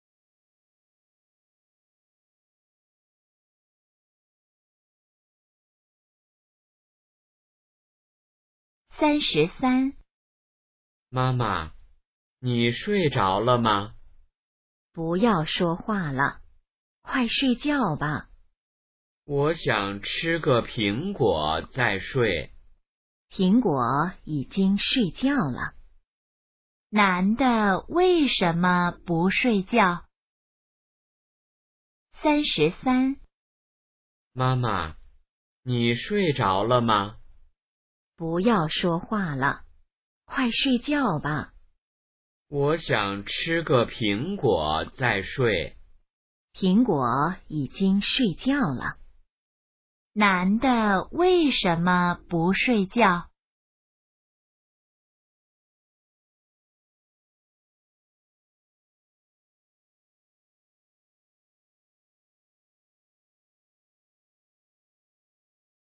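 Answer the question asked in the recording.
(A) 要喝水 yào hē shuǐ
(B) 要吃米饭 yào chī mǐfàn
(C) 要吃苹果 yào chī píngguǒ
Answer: (C) 要吃苹果 yào chī píngguǒ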